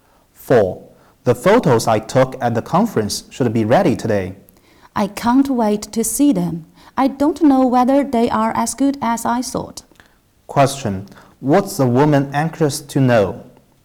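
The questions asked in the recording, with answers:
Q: What's the woman anxious to know?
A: Whether the photos are as good as she thought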